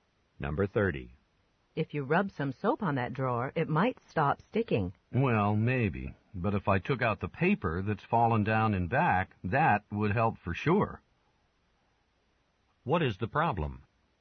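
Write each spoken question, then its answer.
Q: What is the problem?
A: Paper is stuck behind the drawer, so it sticks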